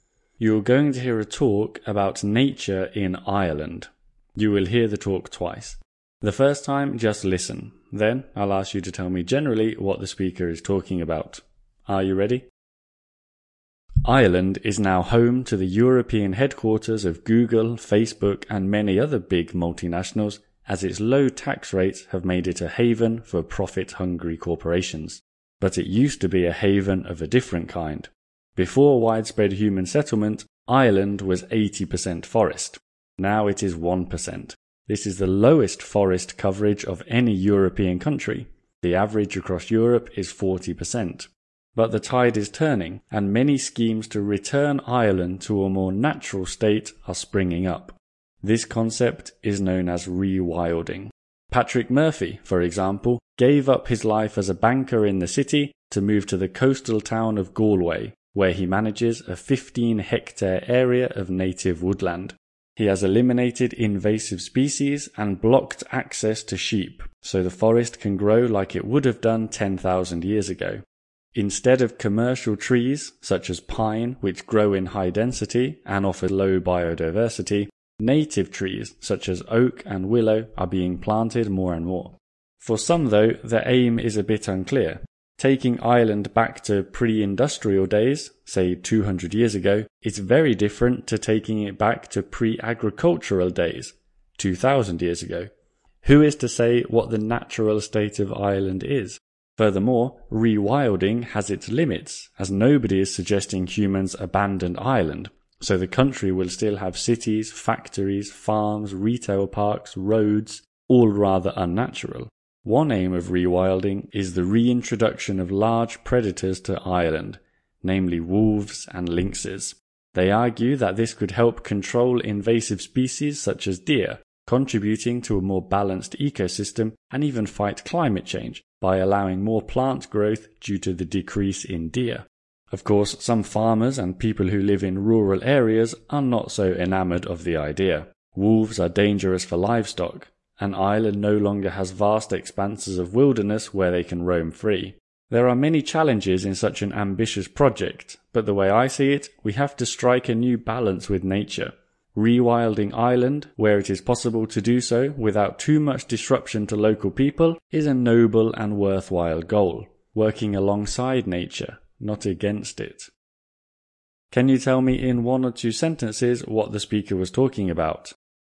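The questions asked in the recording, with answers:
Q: Can you tell me in one or two sentences what the speaker was talking about?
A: Rewilding Ireland: returning its landscape to a more natural state, e.g. native forests and reintroducing predators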